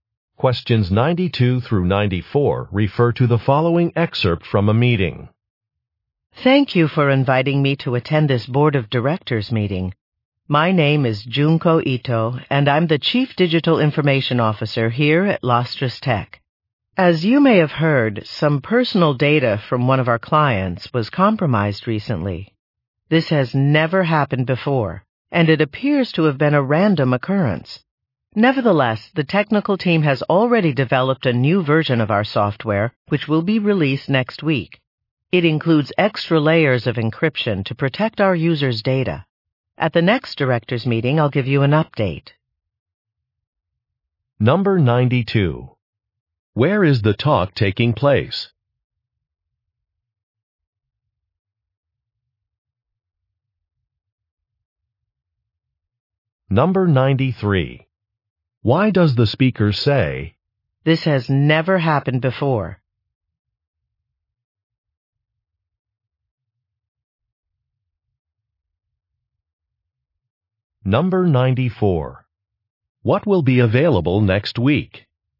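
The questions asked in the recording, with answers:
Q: Where is the talk taking place?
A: At a board of directors meeting

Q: What will be available next week?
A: A new version of the software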